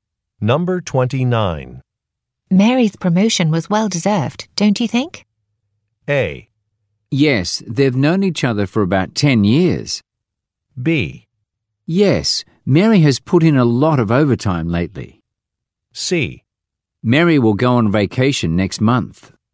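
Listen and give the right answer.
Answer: B: Yes, Mary has put in a lot of overtime lately.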